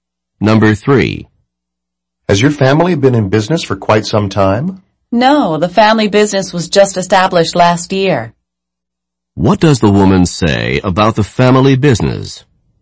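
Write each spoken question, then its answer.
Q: What does the woman say about the family business?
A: It was only established last year.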